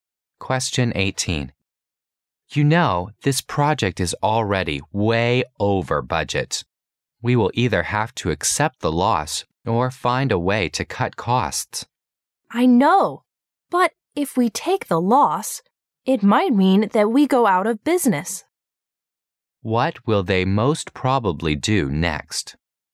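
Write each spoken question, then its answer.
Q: What will they most probably do next?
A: Find a way to cut costs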